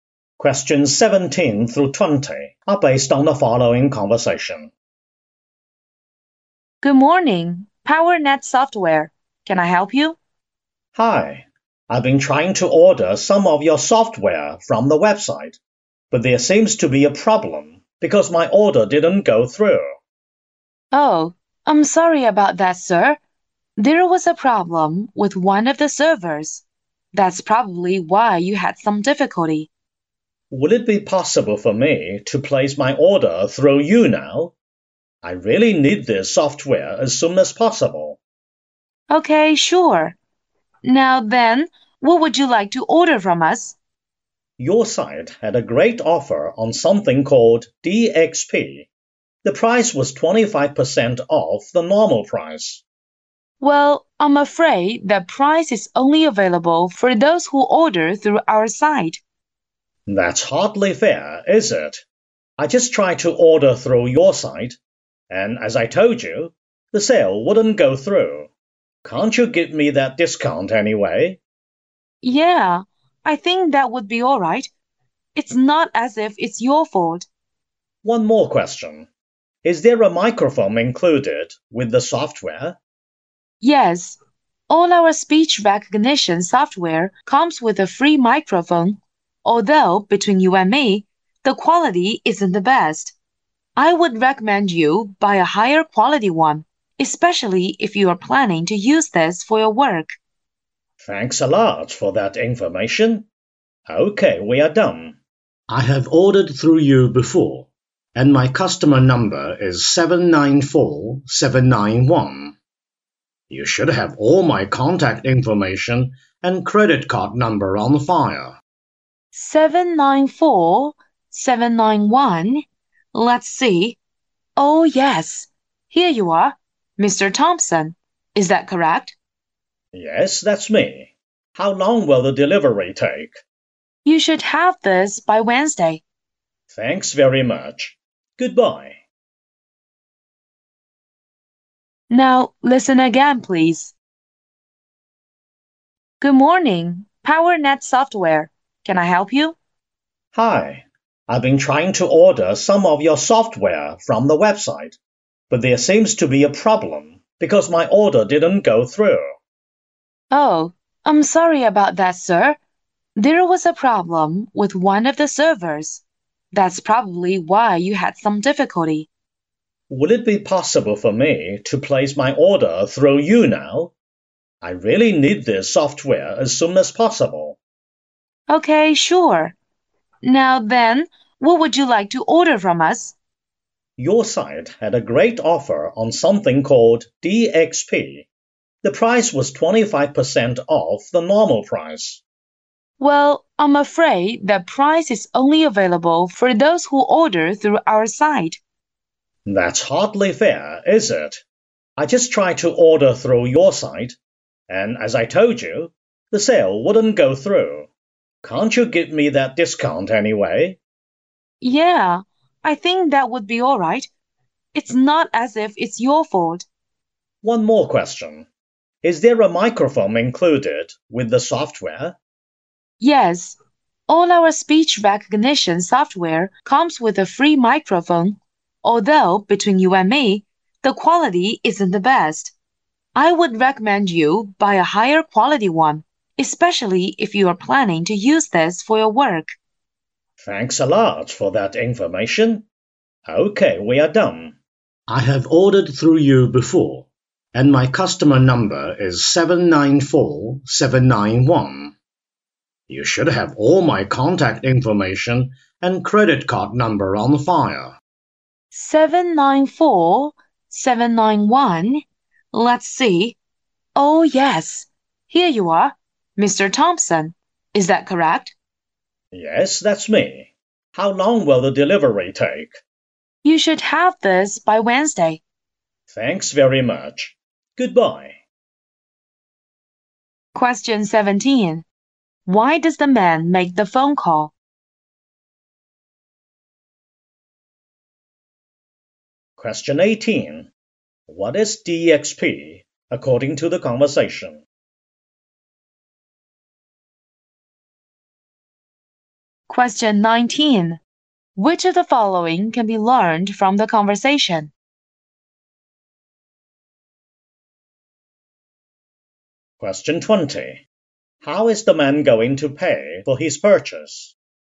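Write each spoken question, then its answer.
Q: Why does the man make the phone call?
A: To order software because his online order failed

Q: What is DXP according to the conversation?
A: Speech recognition software

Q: How is the man going to pay for his purchase?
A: With the credit card on file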